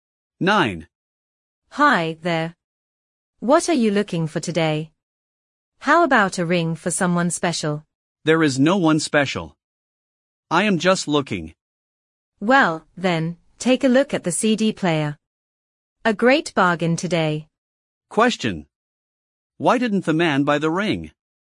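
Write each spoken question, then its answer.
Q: Why didn't the man buy the ring?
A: He has no one special to give it to.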